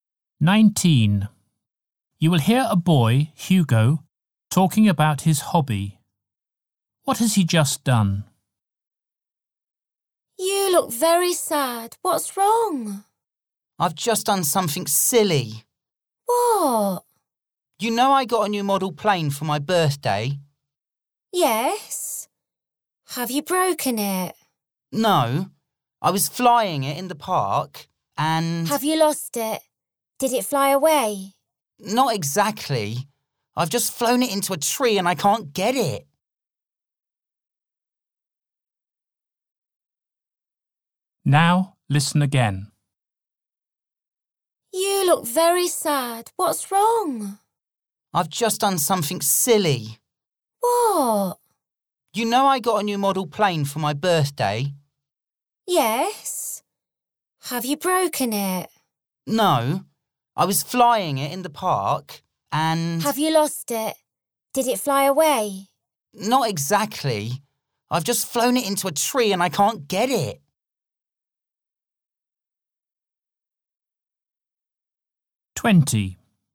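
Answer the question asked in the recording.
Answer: Flown his model plane into a tree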